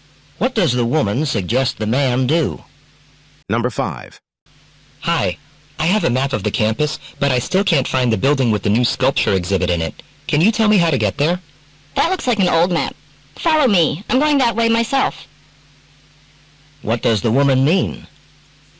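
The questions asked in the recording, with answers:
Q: What does the woman mean?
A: She will take him to the building herself.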